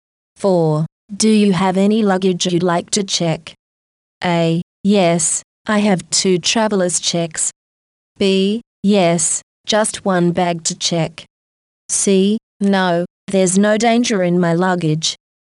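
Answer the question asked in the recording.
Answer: B: Yes, just one bag to check.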